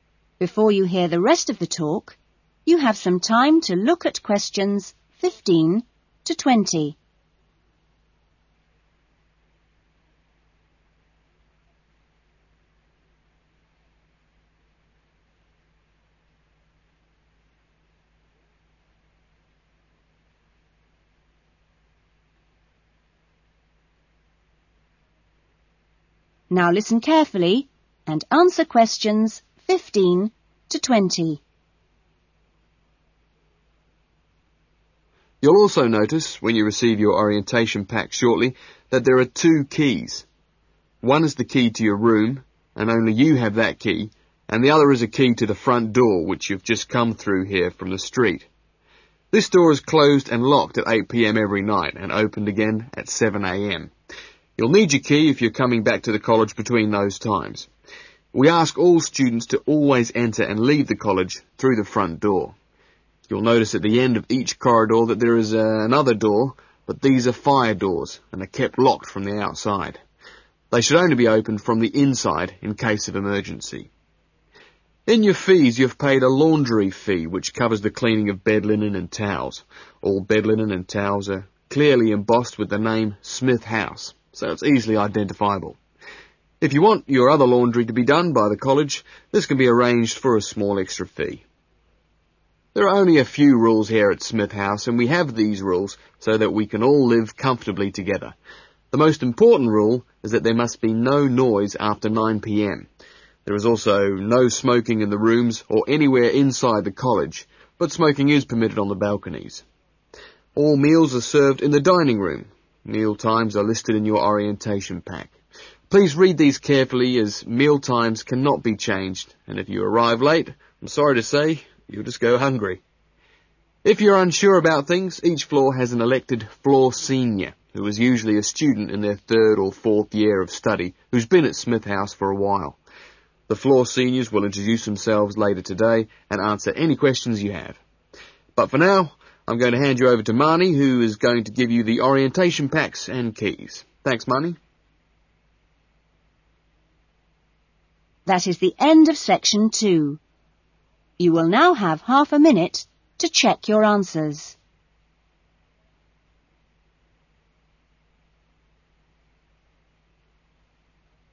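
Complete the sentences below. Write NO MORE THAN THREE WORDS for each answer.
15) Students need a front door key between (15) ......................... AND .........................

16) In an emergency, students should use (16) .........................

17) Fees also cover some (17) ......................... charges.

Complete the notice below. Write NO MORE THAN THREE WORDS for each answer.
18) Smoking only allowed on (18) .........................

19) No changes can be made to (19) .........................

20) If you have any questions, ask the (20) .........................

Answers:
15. 8 pm and 7 am
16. fire doors
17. laundry
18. the balconies
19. meal times
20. floor senior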